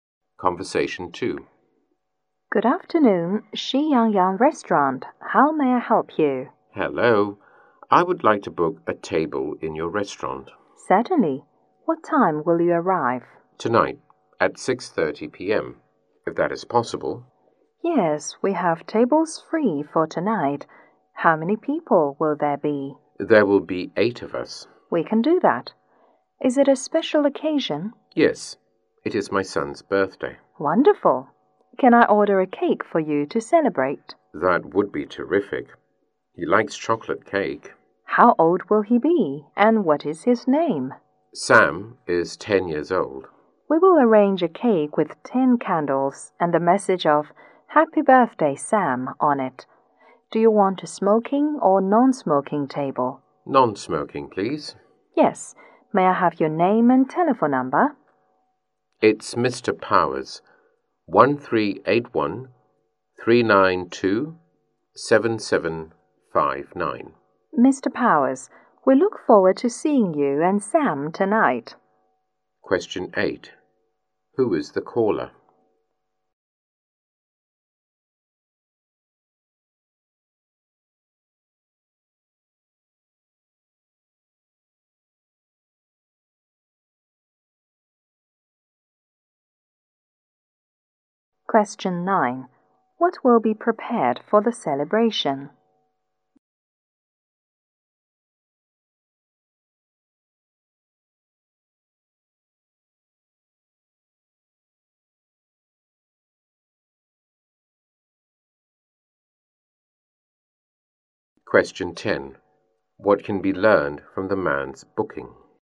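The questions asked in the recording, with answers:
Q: Who is the caller?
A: Mr. Powers

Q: What will be prepared for the celebration?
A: A chocolate birthday cake with 10 candles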